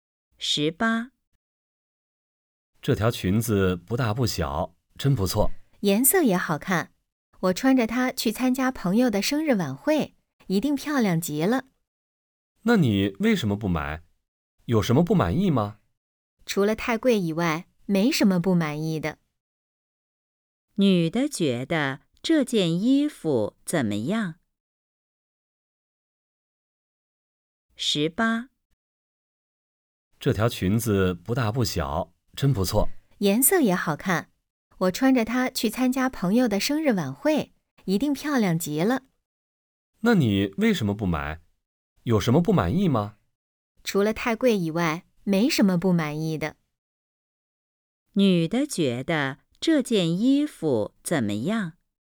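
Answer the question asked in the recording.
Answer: 很好,就是太贵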